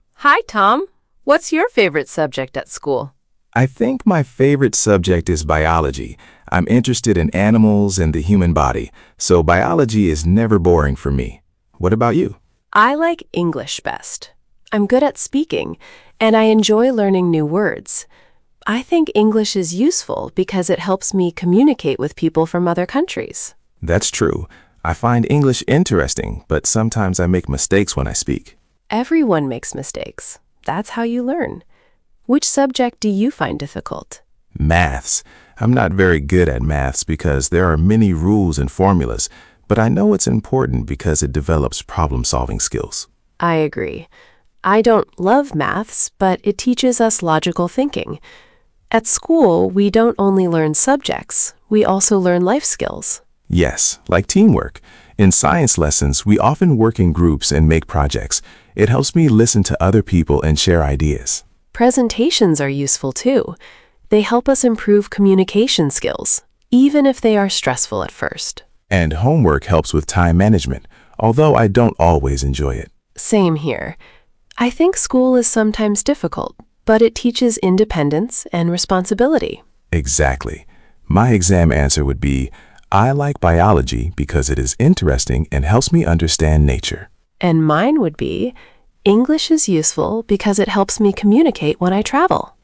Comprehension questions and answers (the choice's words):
Przeczytaj pytania, a potem posłuchaj i wybierz właściwą odpowiedź.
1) What are Ella and Tom talking about?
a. holidays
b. school subjects and life skills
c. sports competitions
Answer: school subjects and life skills

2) What is Tom's favourite subject?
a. biology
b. English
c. maths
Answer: biology

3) What is Ella's favourite subject?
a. PE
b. chemistry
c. English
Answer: English

Uzupełnij zdania zwrotami z nagrania:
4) I'm good ______ speaking.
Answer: at

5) English is useful because it helps me ______ with people from other countries.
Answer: communicate

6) Maths develops problem-______ skills.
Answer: solving

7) Presentations help us improve ______ skills.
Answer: communication

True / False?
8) Tom thinks biology is boring.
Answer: False

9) Ella is good at speaking.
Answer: True

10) Tom finds maths difficult.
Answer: True

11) Ella says maths teaches logical thinking.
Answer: True

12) Tom says group work helps with teamwork.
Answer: True

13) Ella thinks homework helps with creativity.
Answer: False

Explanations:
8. biology is never boring for him.
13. homework helps with time management.

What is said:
Ella: Hi, Tom. What's your favourite subject at school?
Tom: I think my favourite subject is biology. I'm interested in animals and the human body, so biology is never boring for me. What about you?
Ella: I like English best. I'm good at speaking, and I enjoy learning new words. I think English is useful because it helps me communicate with people from other countries.
Tom: That's true. I find English interesting, but sometimes I make mistakes when I speak.
Ella: Everyone makes mistakes. That's how you learn. Which subject do you find difficult?
Tom: Maths. I'm not very good at maths because there are many rules and formulas. But I know it's important because it develops problem-solving skills.
Ella: I agree. I don't love maths, but it teaches us logical thinking. At school, we don't only learn subjects. We also learn life skills.
Tom: Yes, like teamwork. In science lessons, we often work in groups and make projects. It helps me listen to other people and share ideas.
Ella: Presentations are useful too. They help us improve communication skills, even if they are stressful at first.
Tom: And homework helps with time management, although I don't always enjoy it.
Ella: Same here. I think school is sometimes difficult, but it teaches independence and responsibility.
Tom: Exactly. My exam answer would be: I like biology because it is interesting and helps me understand nature.
Ella: And mine would be: English is useful because it helps me communicate when I travel.

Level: A2+/B1